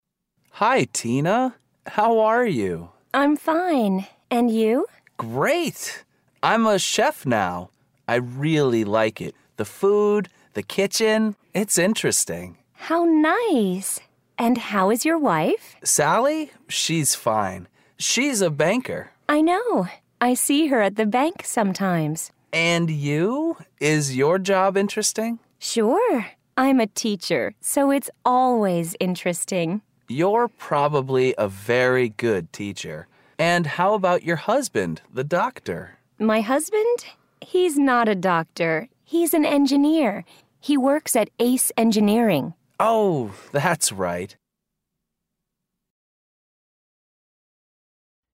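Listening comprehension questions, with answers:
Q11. What is the man's job?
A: He's a chef.

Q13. What is the woman's husband's job?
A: He's an engineer.

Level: Eleventh Grade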